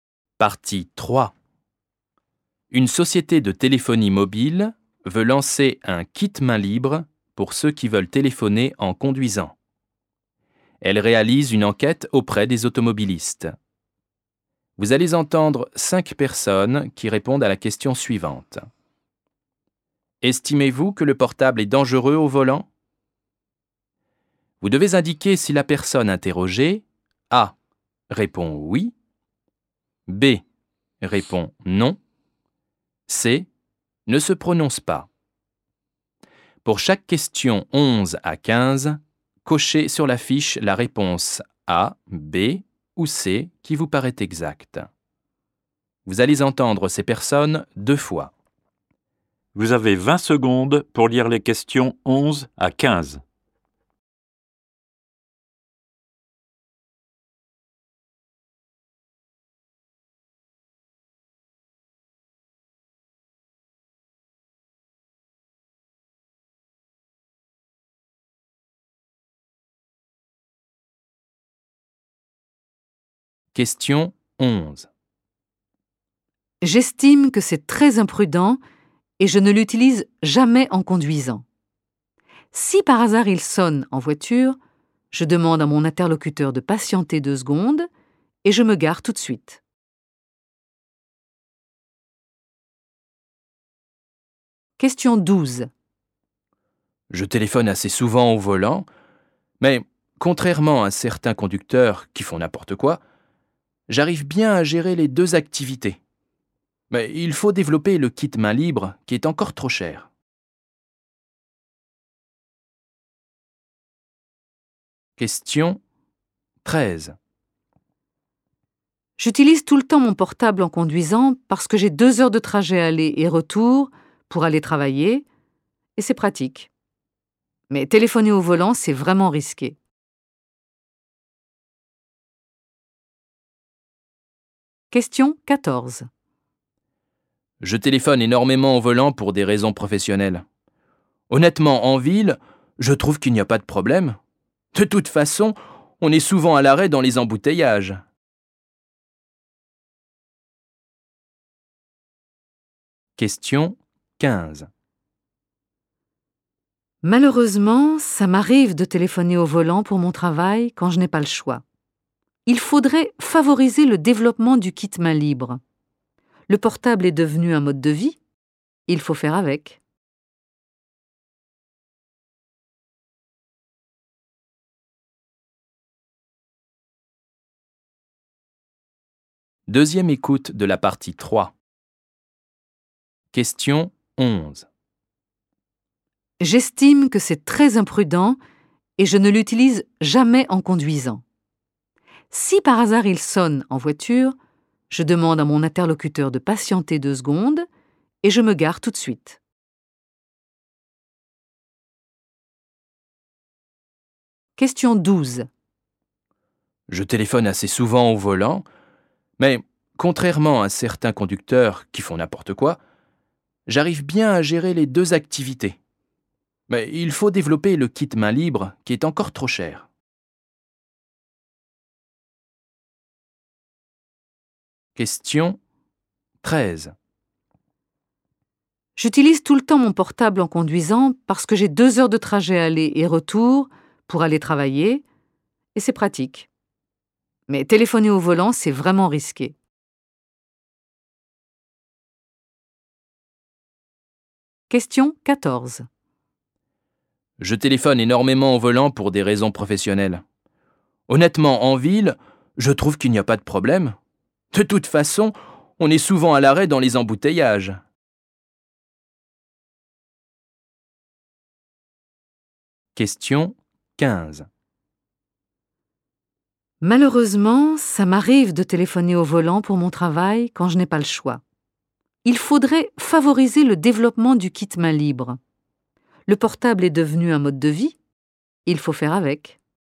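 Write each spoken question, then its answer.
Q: Estimez-vous que le portable est dangereux au volant?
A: A: oui

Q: Estimez-vous que le portable est dangereux au volant?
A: A: oui

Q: Estimez-vous que le portable est dangereux au volant?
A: B: non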